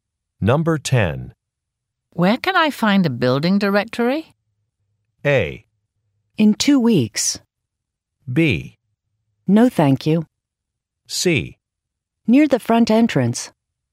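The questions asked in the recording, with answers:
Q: Where can I find a building directory?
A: C: Near the front entrance.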